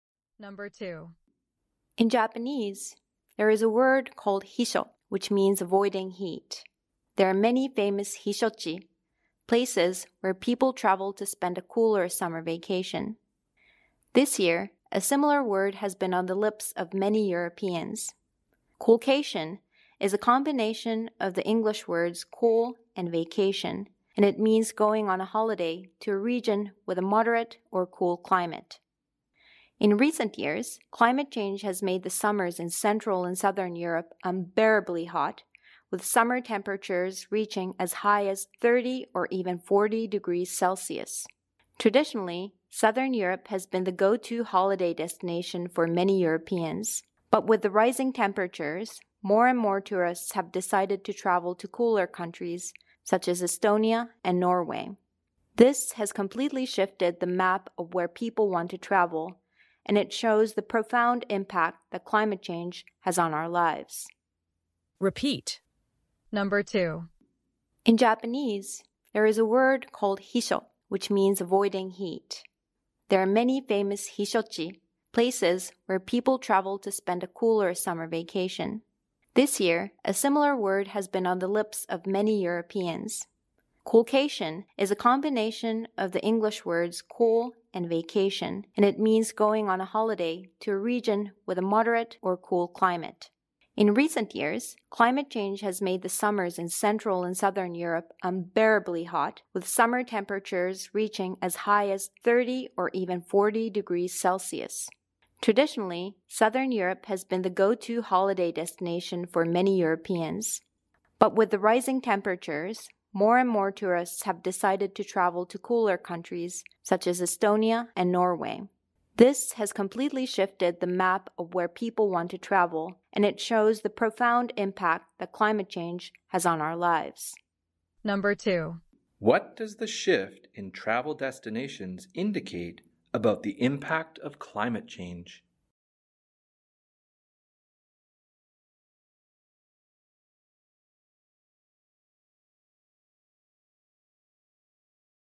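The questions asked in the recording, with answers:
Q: What does the shift in travel destinations indicate about the impact of climate change?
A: Climate change has a profound impact on our lives, pushing tourists from hot southern Europe to cooler countries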